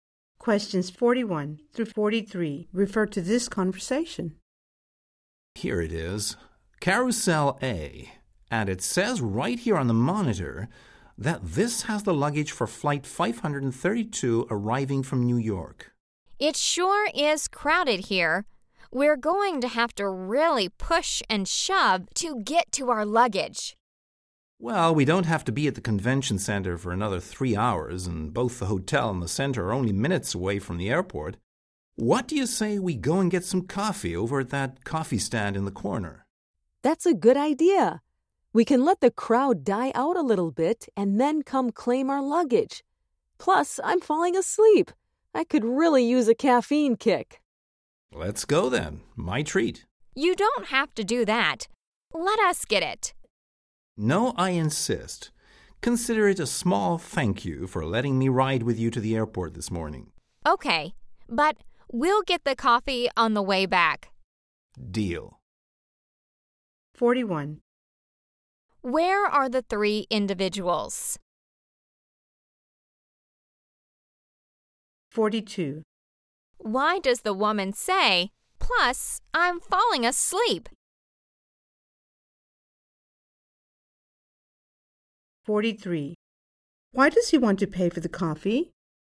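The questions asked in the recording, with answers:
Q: Where are the three individuals?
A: At the airport baggage claim

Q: Why does the woman say, "Plus, I'm falling asleep"?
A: She wants coffee for a caffeine boost

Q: Why does he want to pay for the coffee?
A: To thank them for the ride to the airport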